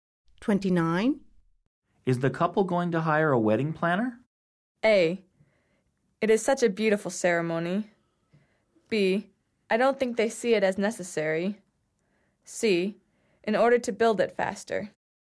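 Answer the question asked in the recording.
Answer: B: I don't think they see it as necessary.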